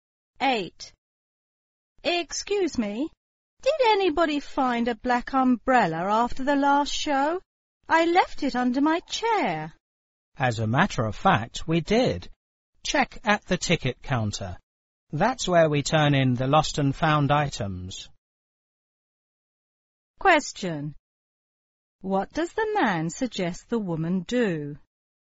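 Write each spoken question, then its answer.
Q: What does the man suggest the woman do?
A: Check at the ticket counter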